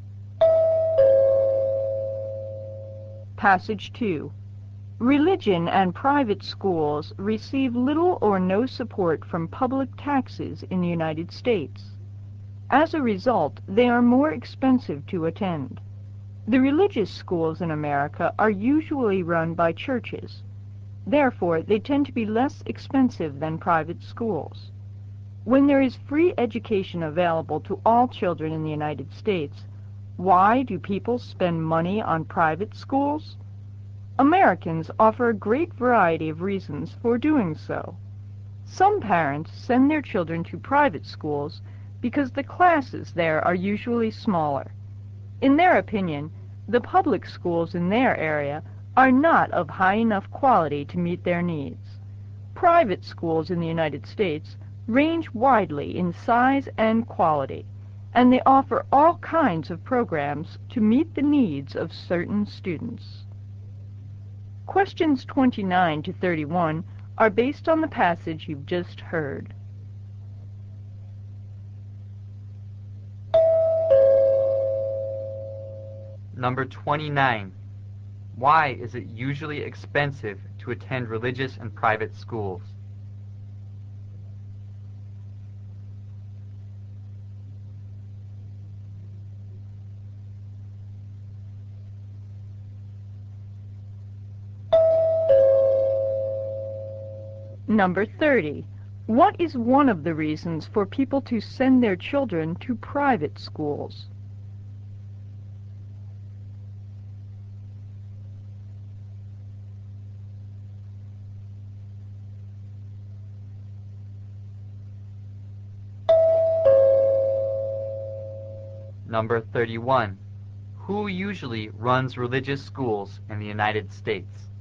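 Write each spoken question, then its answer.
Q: Why is it usually expensive to attend religious and private schools?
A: They receive little or no support from public taxes

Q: What is one of the reasons for people to send their children to private schools?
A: Classes there are usually smaller

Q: Who usually runs religious schools in the United States?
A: Churches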